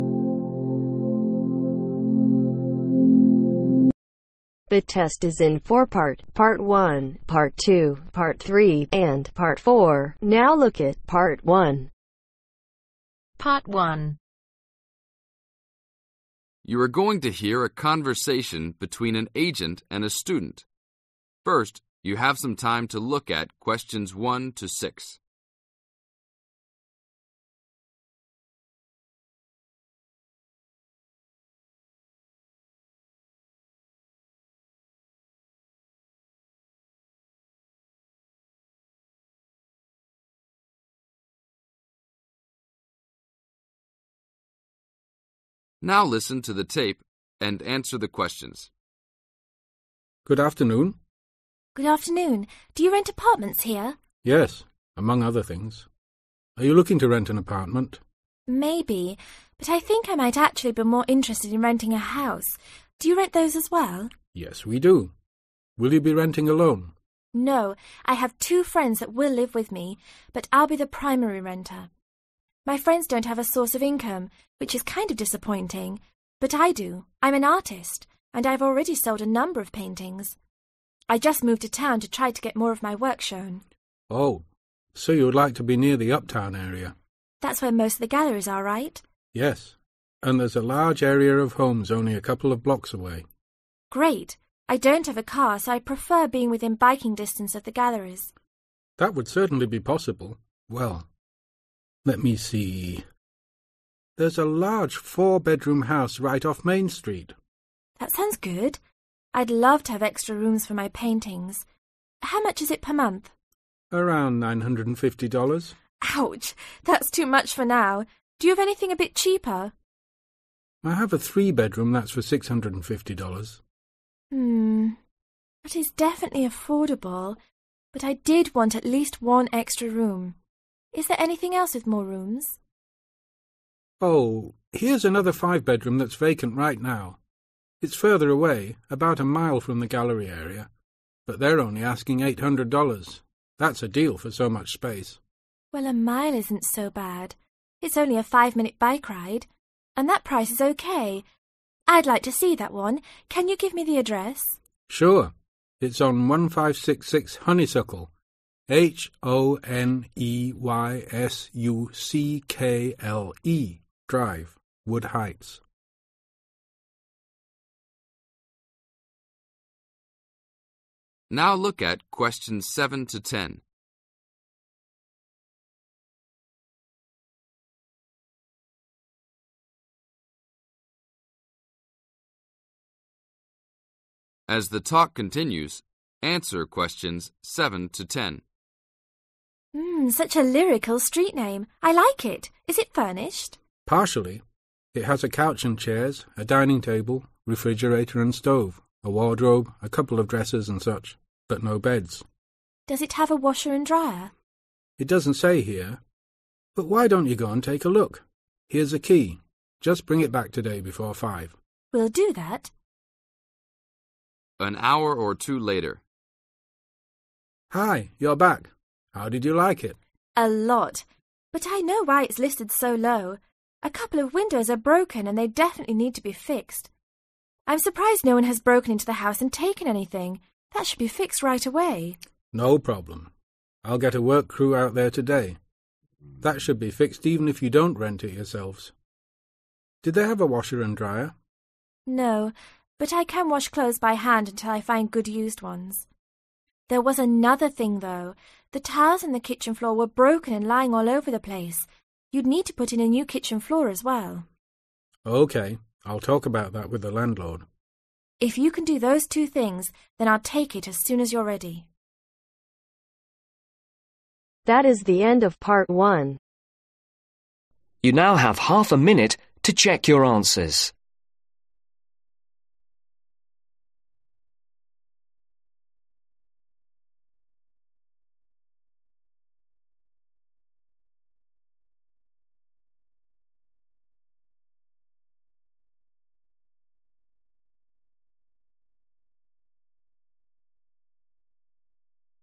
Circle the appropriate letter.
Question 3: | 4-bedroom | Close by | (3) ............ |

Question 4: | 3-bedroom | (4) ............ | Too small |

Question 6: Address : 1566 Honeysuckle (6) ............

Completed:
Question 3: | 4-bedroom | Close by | Expensive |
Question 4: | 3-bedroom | Cheap / affordable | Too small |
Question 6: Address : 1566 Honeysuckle Drive